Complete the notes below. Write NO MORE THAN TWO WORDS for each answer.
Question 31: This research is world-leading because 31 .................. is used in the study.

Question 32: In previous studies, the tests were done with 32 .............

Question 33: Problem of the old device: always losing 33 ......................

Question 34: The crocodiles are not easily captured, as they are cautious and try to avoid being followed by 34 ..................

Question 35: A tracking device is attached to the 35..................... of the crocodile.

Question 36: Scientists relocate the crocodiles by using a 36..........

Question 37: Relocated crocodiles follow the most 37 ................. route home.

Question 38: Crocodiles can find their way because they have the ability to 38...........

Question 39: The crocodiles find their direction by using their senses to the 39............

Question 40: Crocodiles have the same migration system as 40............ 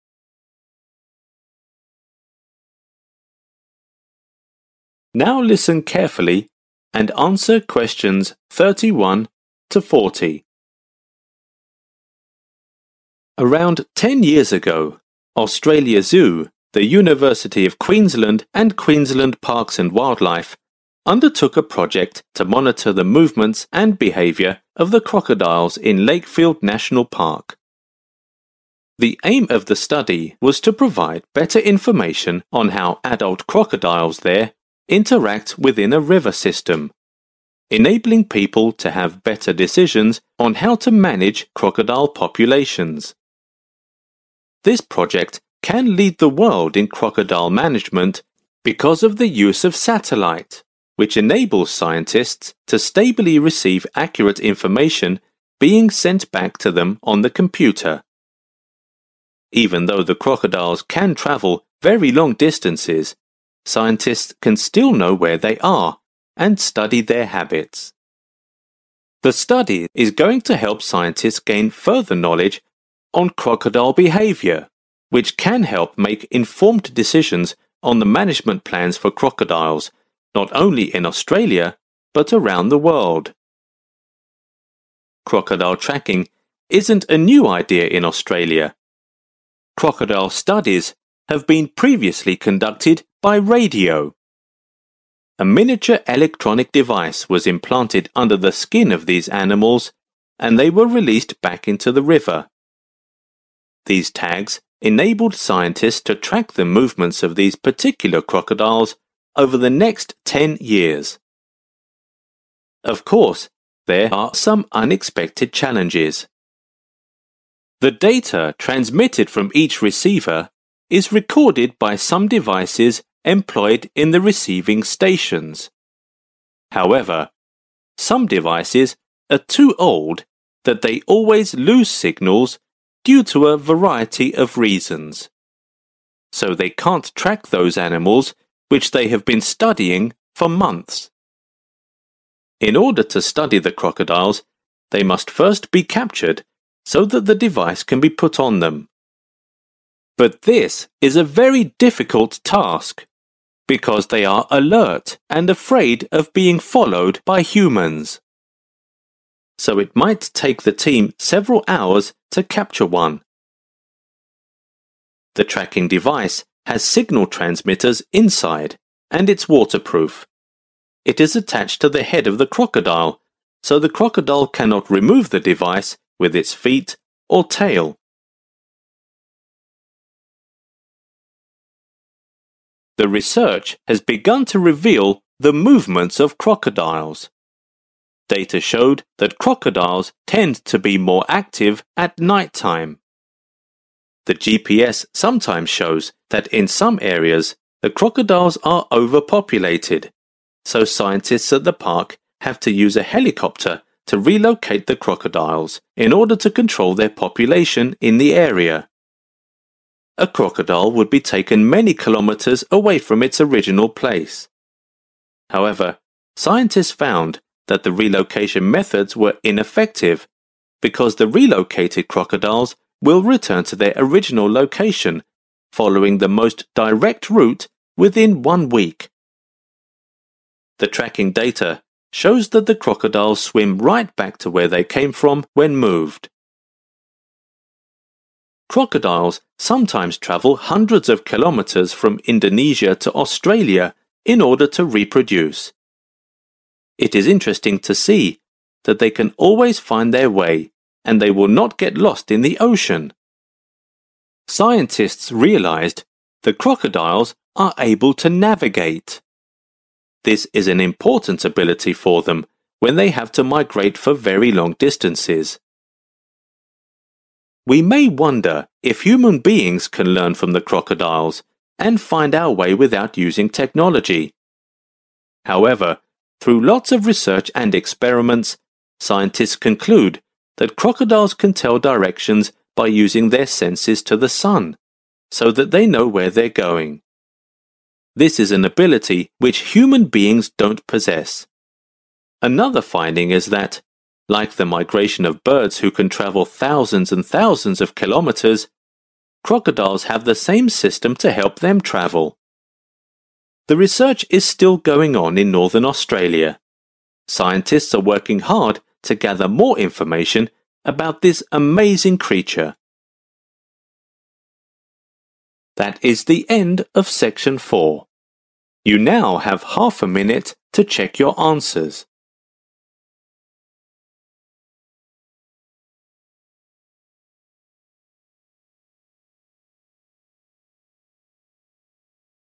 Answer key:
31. satellite
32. radio
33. signals
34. human/humans/human beings
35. head
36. helicopter
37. direct
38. navigate
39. sun
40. birds